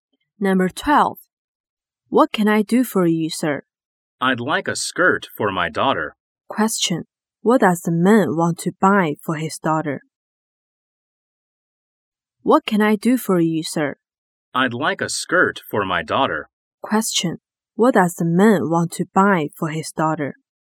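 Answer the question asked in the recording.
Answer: A skirt.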